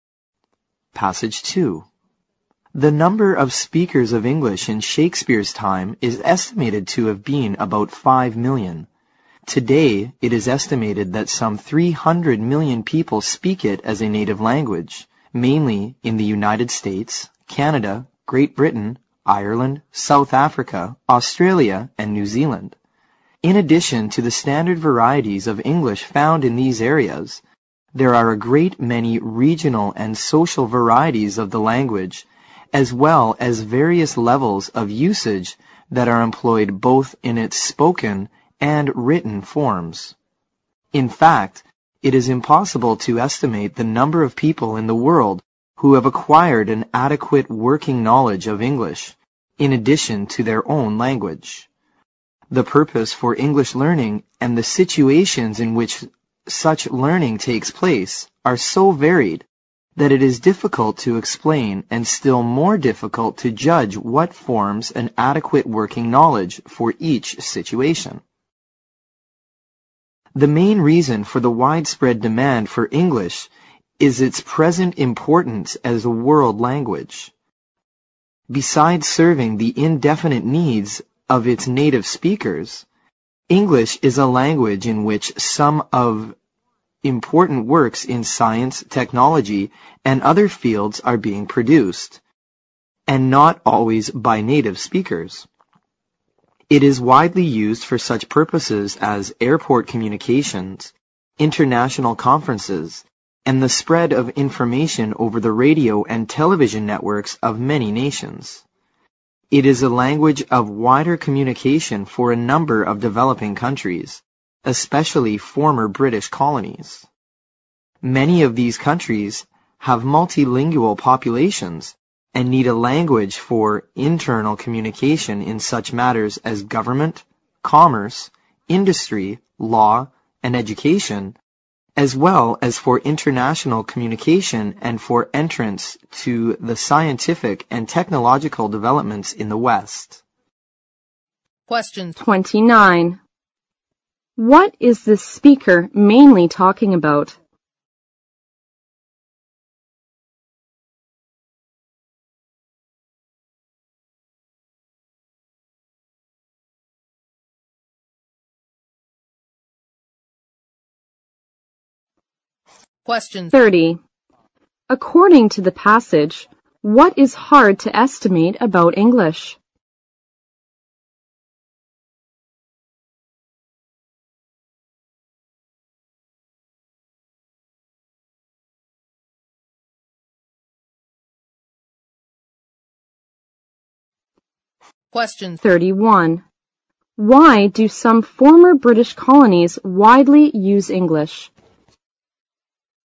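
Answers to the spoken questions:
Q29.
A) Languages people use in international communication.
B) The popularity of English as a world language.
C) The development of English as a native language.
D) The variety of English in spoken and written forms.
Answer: B) The popularity of English as a world language.
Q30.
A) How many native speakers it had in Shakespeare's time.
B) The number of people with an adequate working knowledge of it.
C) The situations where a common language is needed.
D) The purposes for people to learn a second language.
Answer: B) The number of people with an adequate working knowledge of it.
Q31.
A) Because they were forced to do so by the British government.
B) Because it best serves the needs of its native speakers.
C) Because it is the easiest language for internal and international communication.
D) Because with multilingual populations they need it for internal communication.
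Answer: D) Because with multilingual populations they need it for internal communication.

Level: 六级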